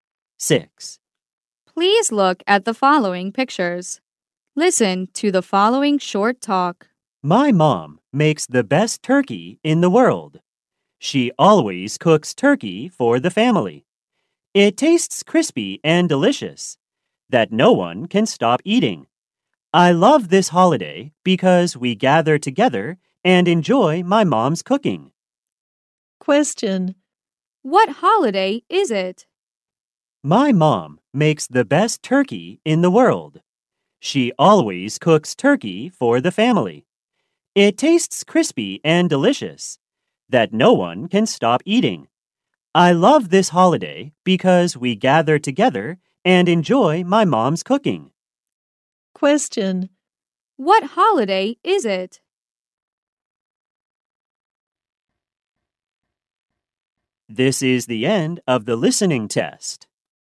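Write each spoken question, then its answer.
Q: What holiday is it?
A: Thanksgiving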